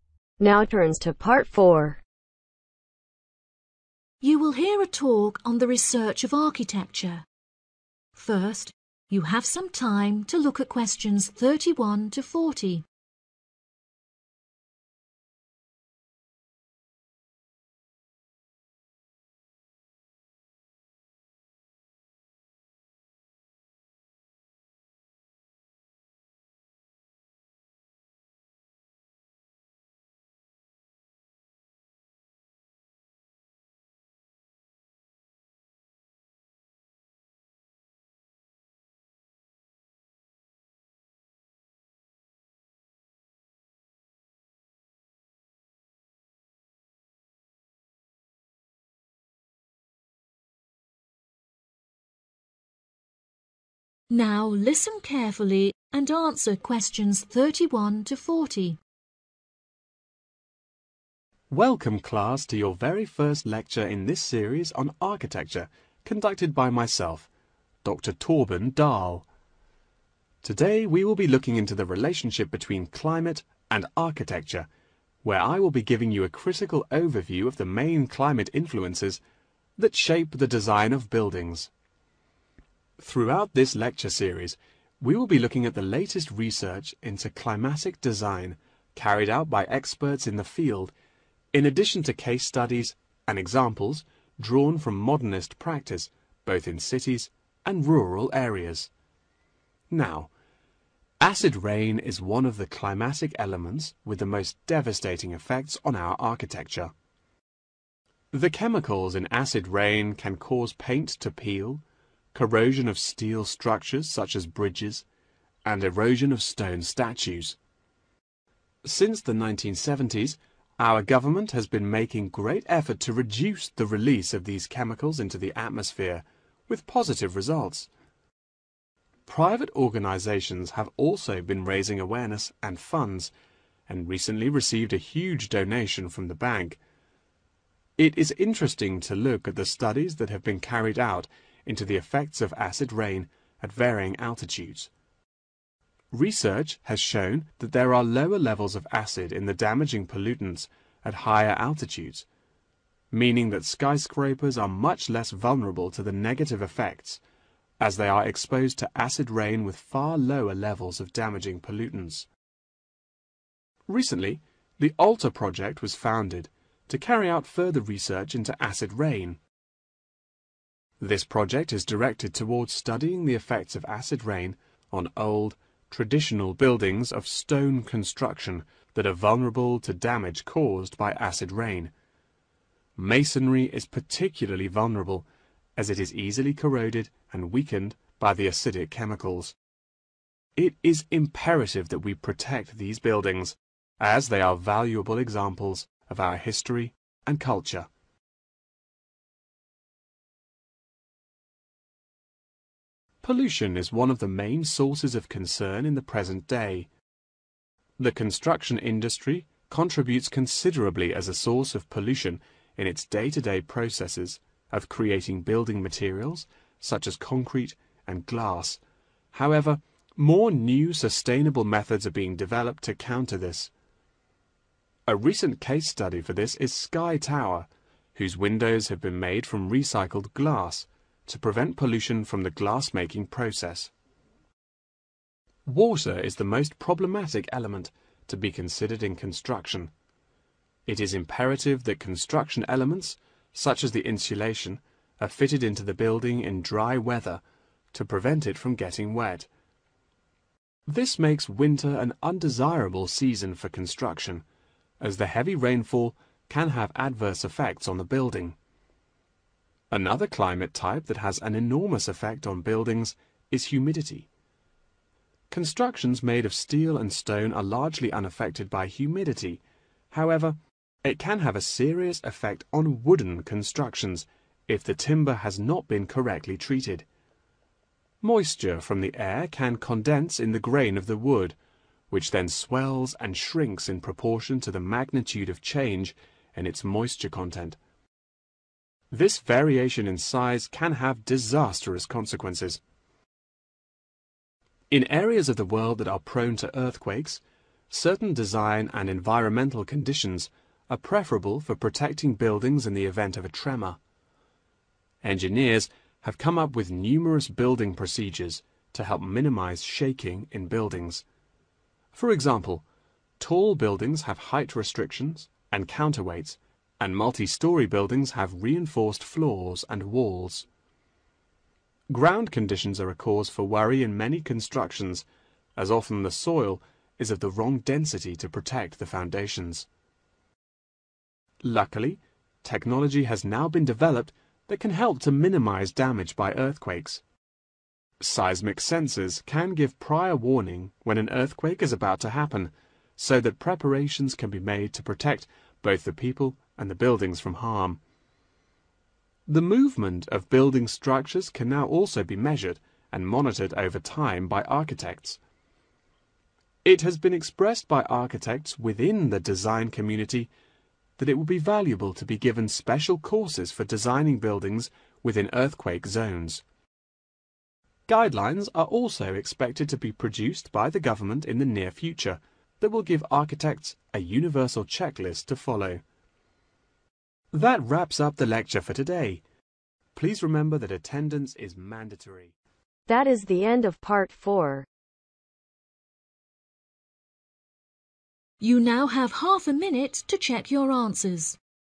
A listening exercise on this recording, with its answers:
Write NO MORE THAN TWO WORDS for each answer.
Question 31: Cases and examples are from practice conducted in 31 ............ as well as rural areas.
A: cities

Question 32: Funds have been received from a 32 ............. .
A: bank

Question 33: 33 ............. experience lower levels of acid in damaging pollutants.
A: Skyscrapers

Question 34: In recent years, Alter project focuses on the buildings made of 34 ..............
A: stone

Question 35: 35 .............. is used to reduce pollution in Sky Tower.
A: Recycled glass

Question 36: Construction is affected by the increased 36 ............... in winter.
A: rainfall

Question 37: Humidity affects the 37 ................. buildings whose grain can condensed moisture from the air.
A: wooden

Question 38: Ground conditions can be a problem when the density of the 38 ................ is wrong.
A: soil

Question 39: Architects can now monitor the 39 ................. of buildings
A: movement

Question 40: The government should make 40 .................. for the architects.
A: guidelines